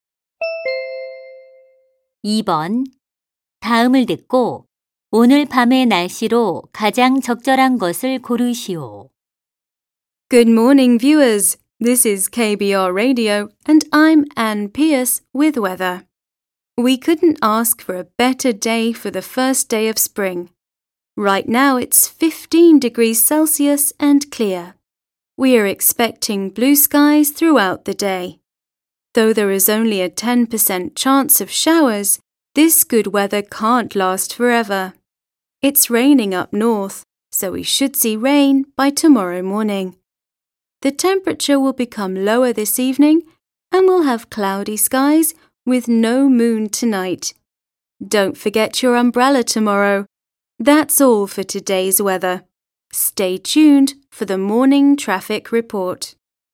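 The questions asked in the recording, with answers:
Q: 다음을 듣고 오늘 밤의 날씨로 가장 적절한 것을 고르시오.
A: 흐림 (달 없는 흐린 하늘)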